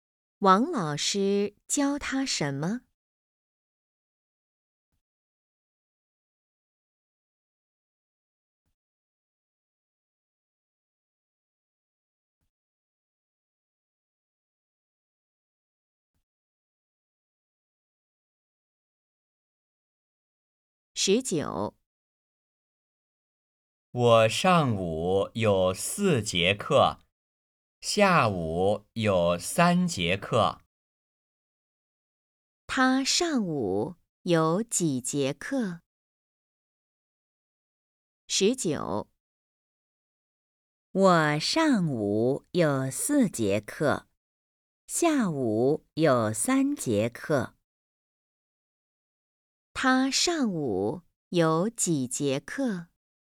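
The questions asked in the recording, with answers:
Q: 他上午有几节课?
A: 四节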